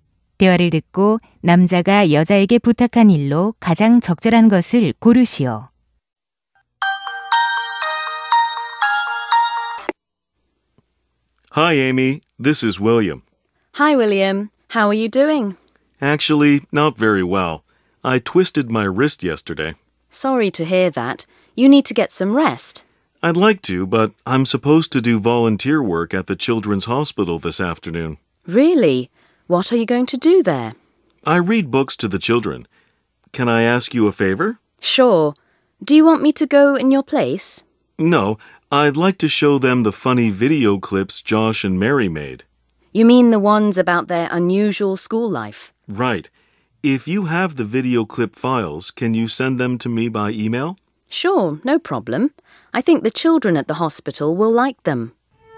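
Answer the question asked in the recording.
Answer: 동영상 파일을 이메일로 보내 주기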